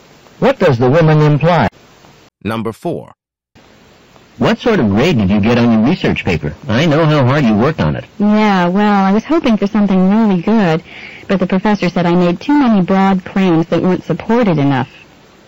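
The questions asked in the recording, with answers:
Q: What can be inferred about the woman's paper?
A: She got a lower grade than she hoped because her claims weren't well supported.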